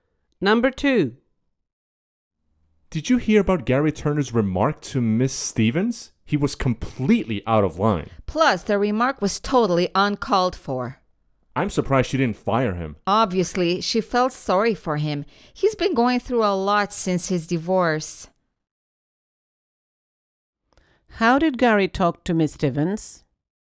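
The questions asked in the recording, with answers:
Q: How did Gary talk to Miss Stevens?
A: Inappropriately; his remark was out of line and uncalled for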